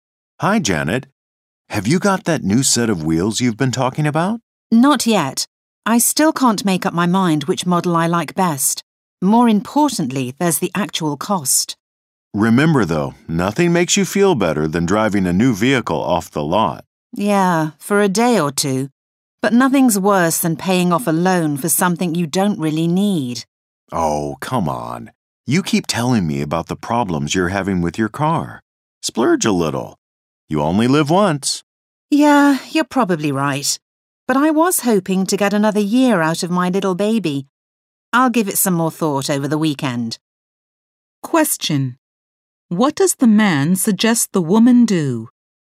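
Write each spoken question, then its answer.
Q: What does the man suggest the woman do?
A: Go ahead and buy a new car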